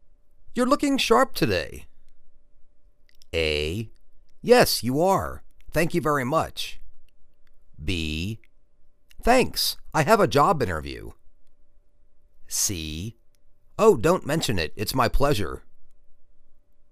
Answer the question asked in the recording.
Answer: Thanks. I have a job interview.